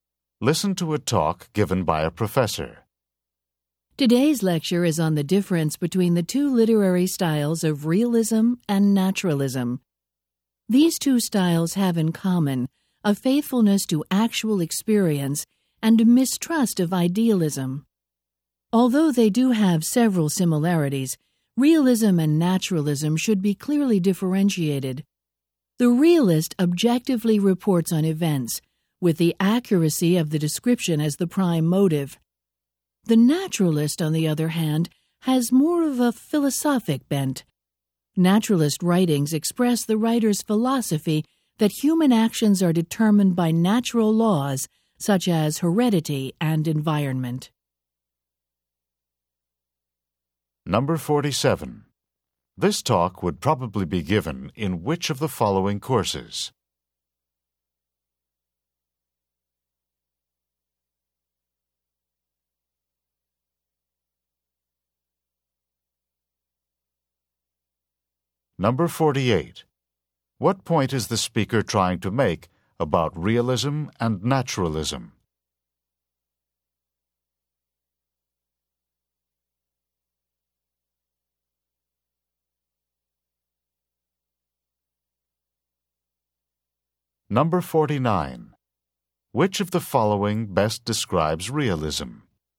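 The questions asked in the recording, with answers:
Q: What point is the speaker trying to make about realism and naturalism?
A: Though similar, they should be clearly differentiated

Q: Which of the following best describes realism?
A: Objective, accurate reporting of events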